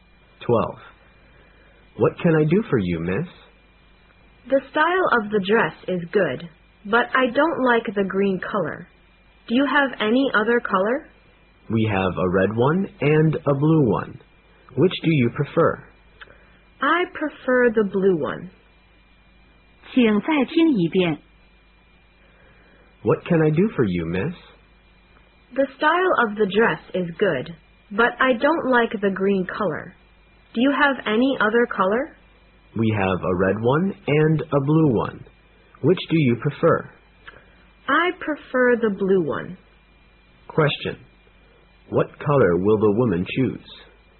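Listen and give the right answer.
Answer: Blue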